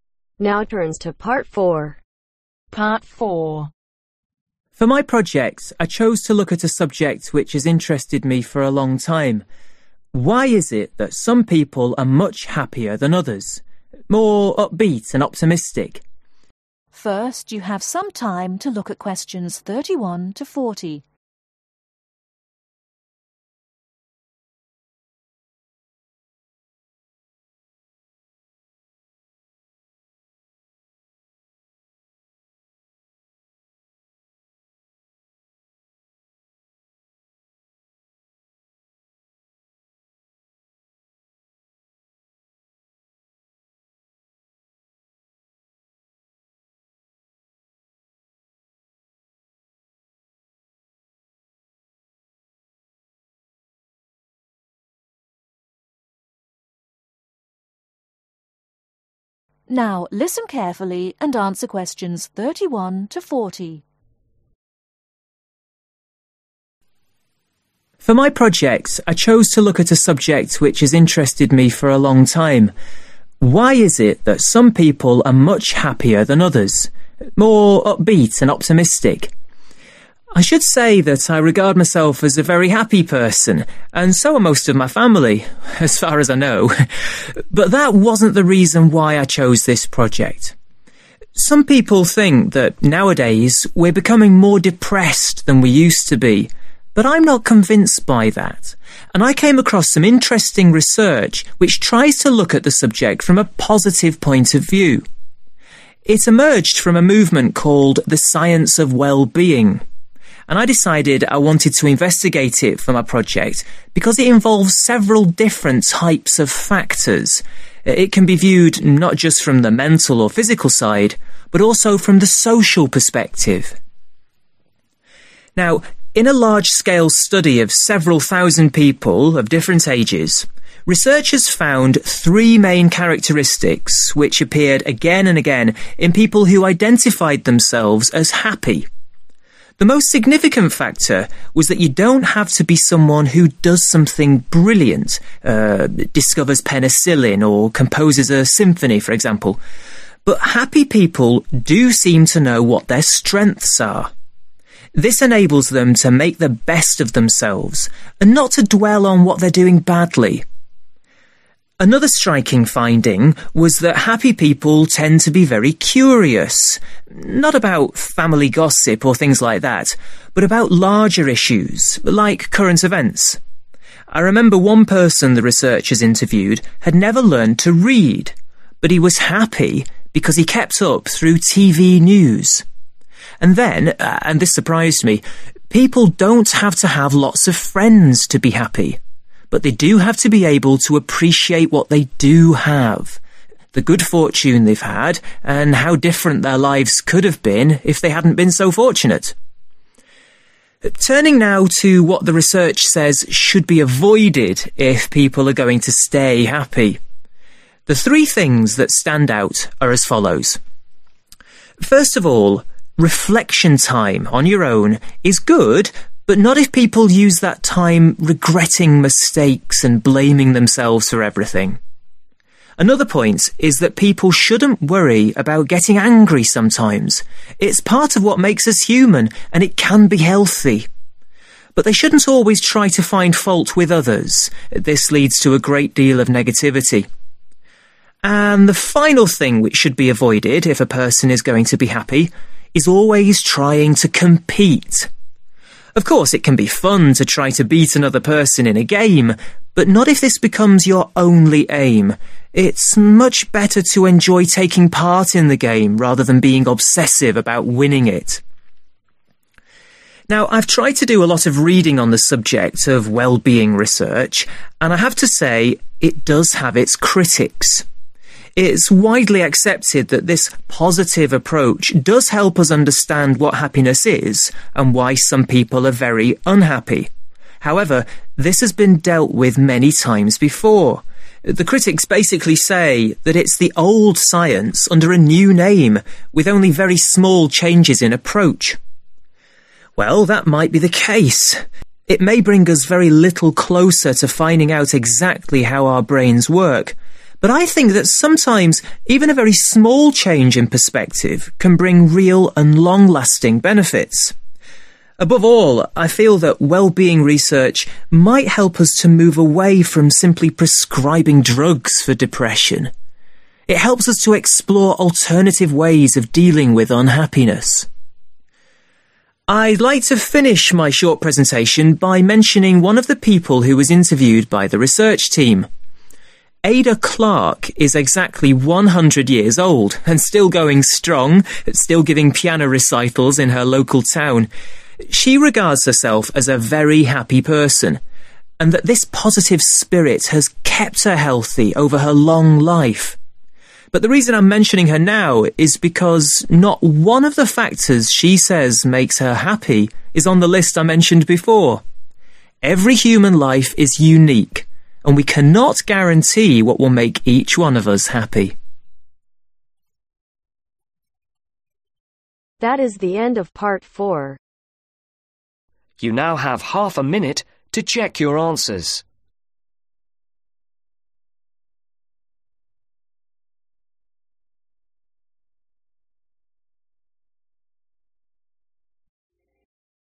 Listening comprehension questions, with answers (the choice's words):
Choose the correct letter A , B or C.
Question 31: Carl chose well – being for his project because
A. it is an issue which many people worry about.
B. he and his relatives are generally very happy.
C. it can be looked at from several different angles.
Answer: it can be looked at from several different angles.

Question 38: What is the main criticism about well-being research ?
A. it ignores the reason why people become unhappy.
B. it is not saying anything new or original.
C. it cannot define what happiness really is.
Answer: it is not saying anything new or original.

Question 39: What does Carl think is the main benefit of well-being research ?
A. it can help us understand how the brain works.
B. it can help develop better medicines for depression.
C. it encourages us to find new ways to help depression.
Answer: it encourages us to find new ways to help depression.

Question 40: Carl talks about the 100-year-old woman in order to show that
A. keeping busy makes people live longer.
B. happiness contributes to a healthy life.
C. different things make different people happy.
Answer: different things make different people happy.